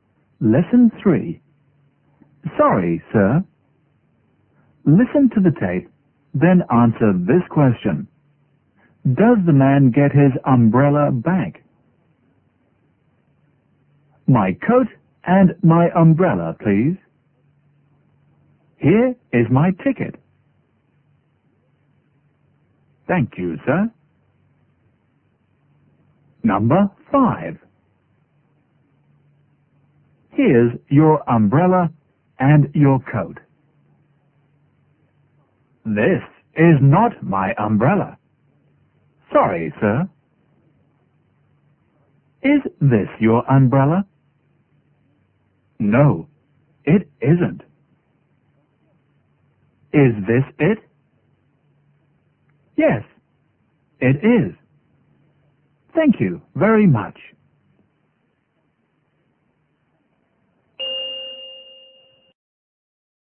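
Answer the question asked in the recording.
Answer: Yes, he does.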